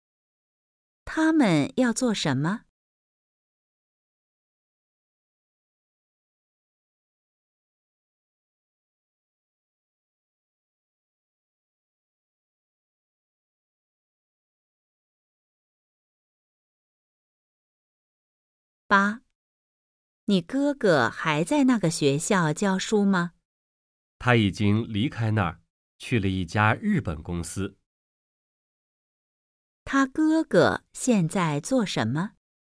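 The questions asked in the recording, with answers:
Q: 他哥哥现在做什么?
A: 在一家日本公司工作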